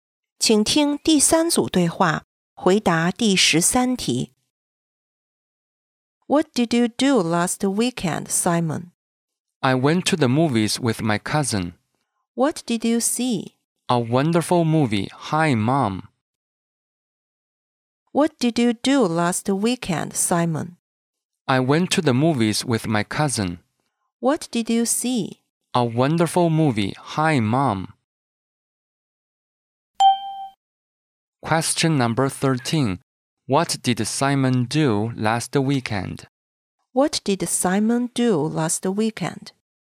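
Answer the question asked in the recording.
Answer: He went to the movies with his cousin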